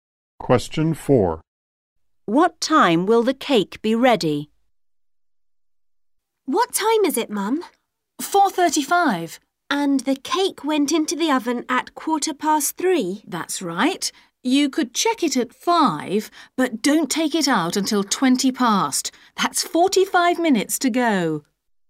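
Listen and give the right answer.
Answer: 5:20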